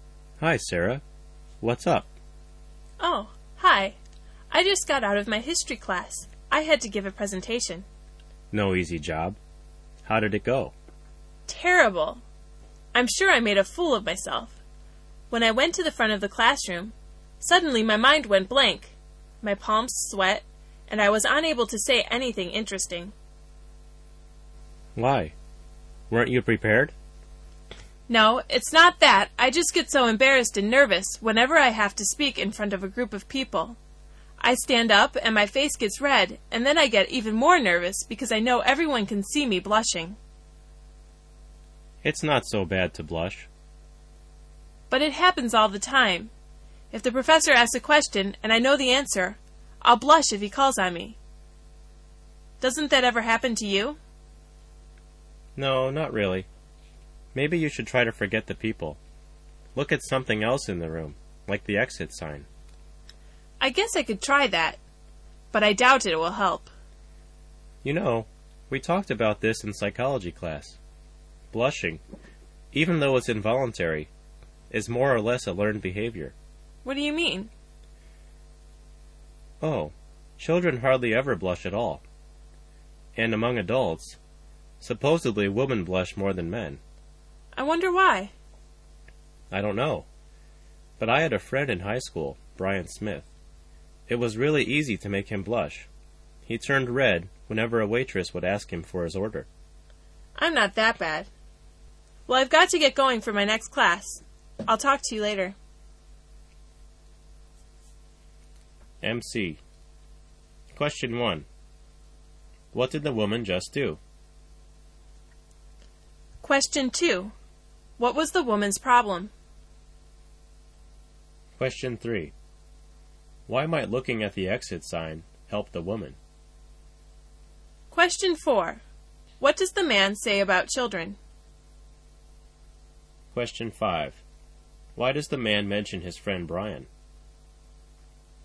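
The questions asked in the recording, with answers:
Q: What did the woman just do?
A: She gave a presentation in her history class.

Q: What was the woman's problem?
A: She got nervous and blushed speaking in front of people, and her mind went blank.

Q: Why might looking at the exit sign help the woman?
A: It would help her forget about the people watching her.

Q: What does the man say about children?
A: They hardly ever blush.

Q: Why does the man mention his friend Brian?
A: As an example of someone who blushed very easily.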